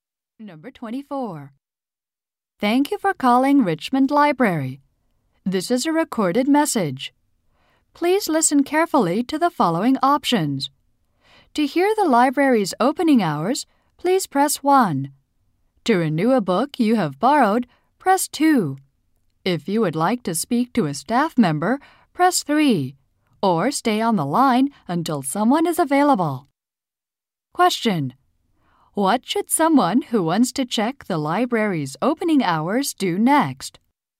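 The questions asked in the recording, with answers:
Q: What should someone who wants to check the library's opening hours do next?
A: Press 1.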